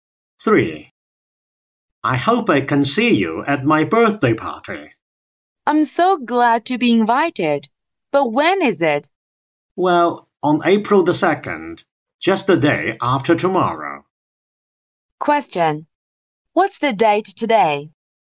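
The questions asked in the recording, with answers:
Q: What's the date today?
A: March 31st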